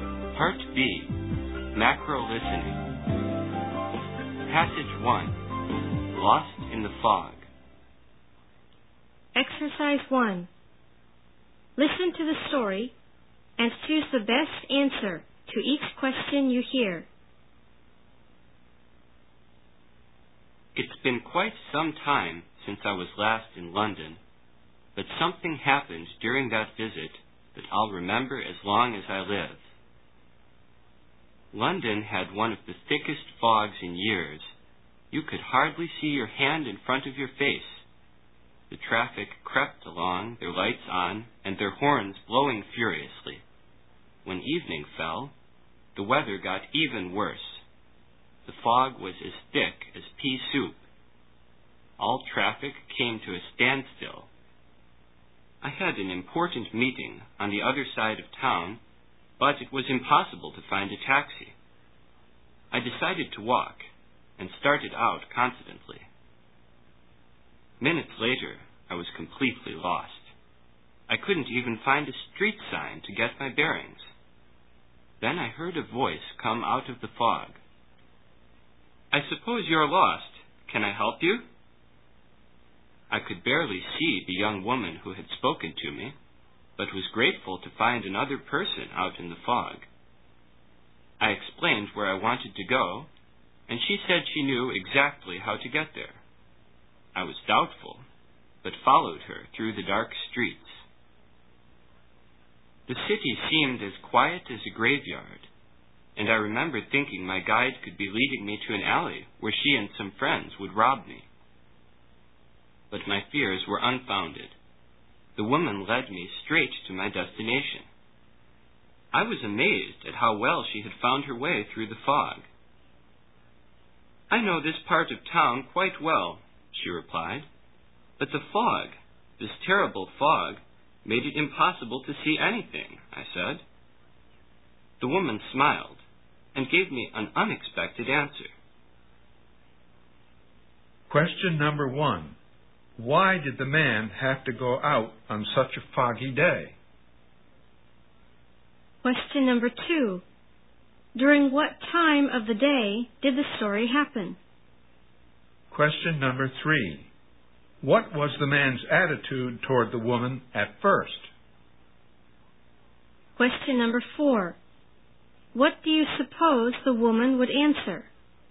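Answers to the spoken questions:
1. He had an important meeting on the other side of town
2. In the evening
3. He was doubtful and suspicious of her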